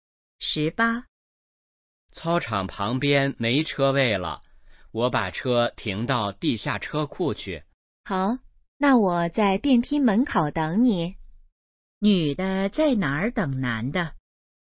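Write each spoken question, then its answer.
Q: 女的在哪儿等男的?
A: 电梯门口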